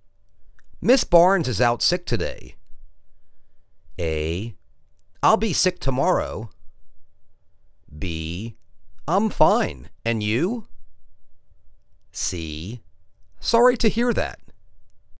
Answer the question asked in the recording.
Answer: Sorry to hear that.